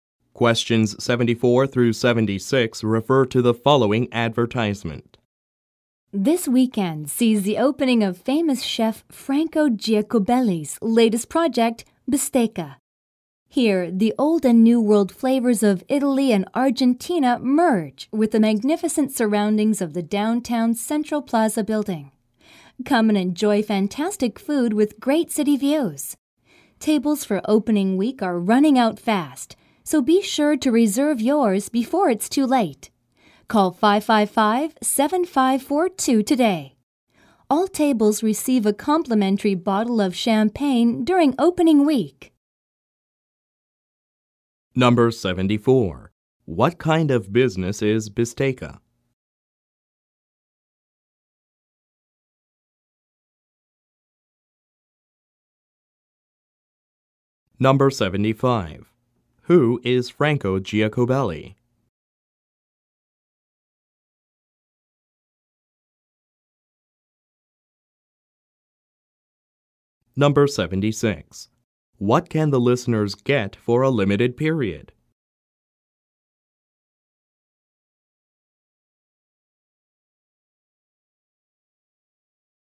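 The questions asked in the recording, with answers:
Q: What kind of business is Bisteca?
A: A restaurant

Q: Who is Franco Giacobelli?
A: A famous chef

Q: What can the listeners get for a limited period?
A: A complimentary bottle of champagne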